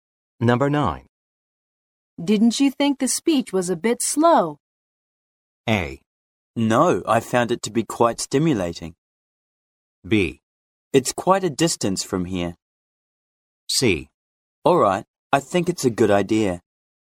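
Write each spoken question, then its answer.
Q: Didn't you think the speech was a bit slow?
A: A: No, I found it to be quite stimulating.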